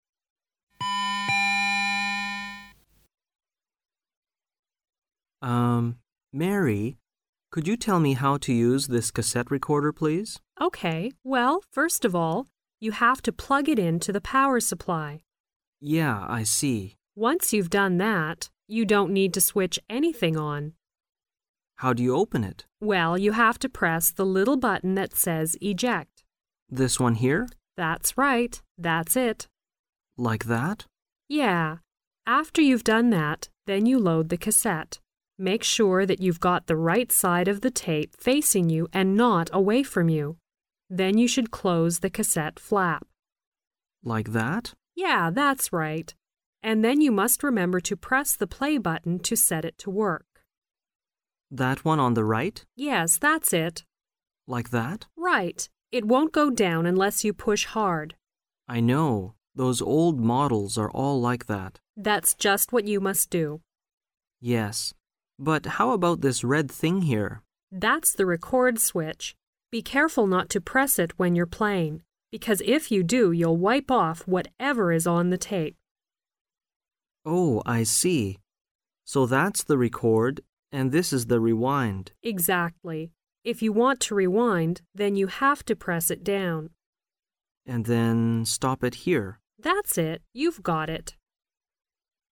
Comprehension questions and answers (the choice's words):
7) What must you make sure when you load the cassette?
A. That you open the recorder.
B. That you get the power supply.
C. That you get the right side of the tape facing you.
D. That you switch the recorder on.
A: That you get the right side of the tape facing you.

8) What may the red thing do besides recording?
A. Wipe off the sound on the tape.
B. Play the recorder.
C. Set the recorder to work.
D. Stop the recorder.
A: Wipe off the sound on the tape.